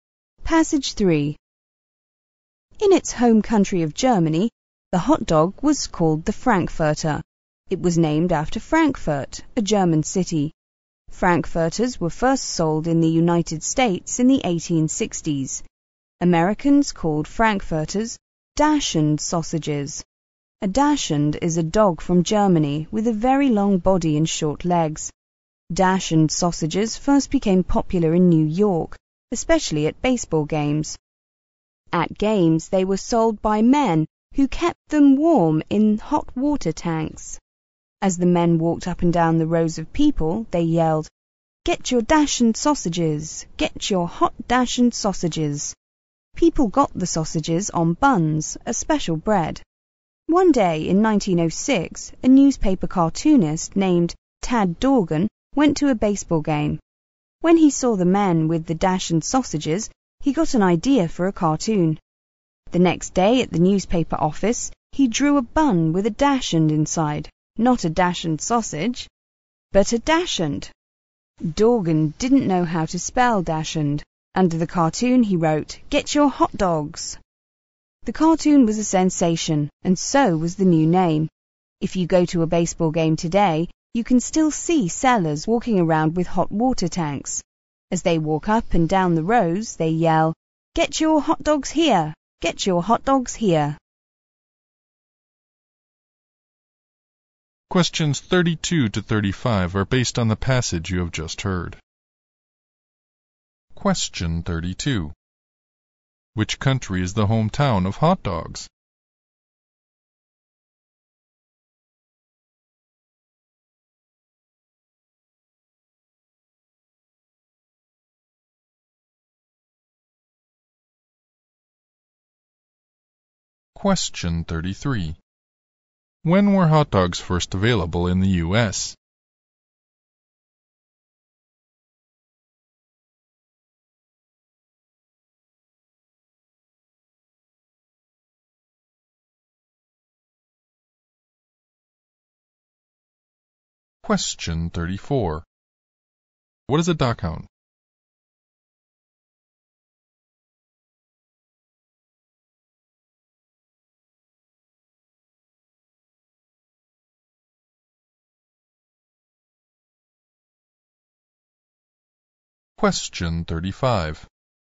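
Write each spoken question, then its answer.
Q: Which country is the hometown of hot dogs?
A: Germany

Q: When were hot dogs first available in the U.S.?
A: In the 1860s

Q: What is a dachshund?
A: A German dog with a very long body and short legs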